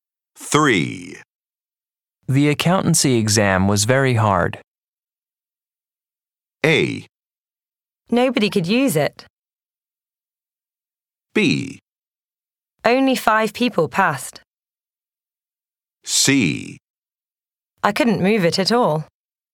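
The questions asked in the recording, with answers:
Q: The accountancy exam was very hard.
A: B: Only 5 people passed.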